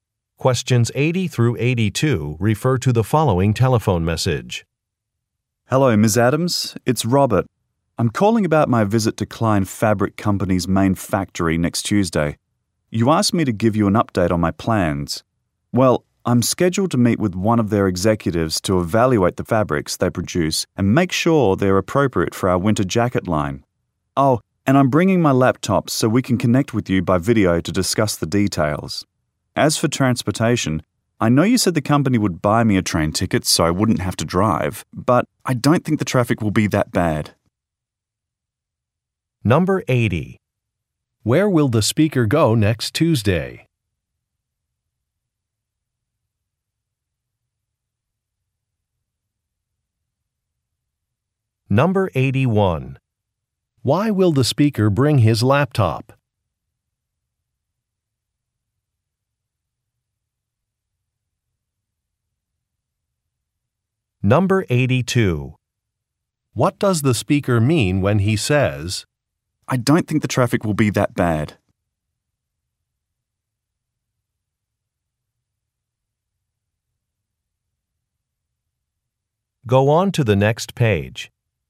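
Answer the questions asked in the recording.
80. A fabric factory
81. To connect by video
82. He plans to drive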